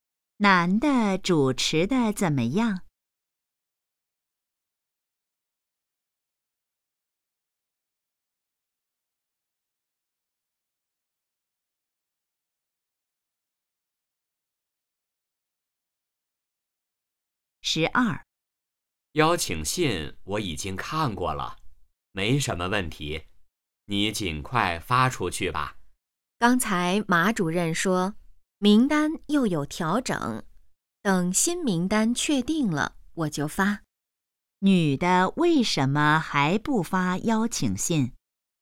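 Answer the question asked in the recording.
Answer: 名单又有调整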